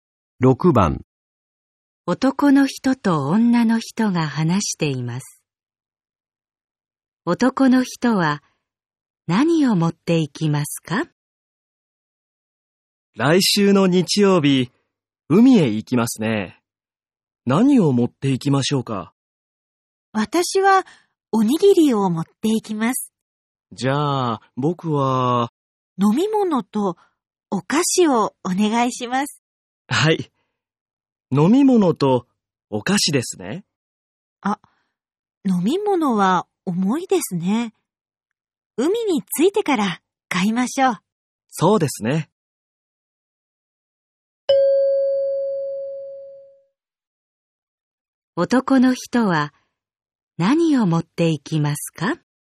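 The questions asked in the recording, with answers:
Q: 男の人は何を持っていきますか?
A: お菓子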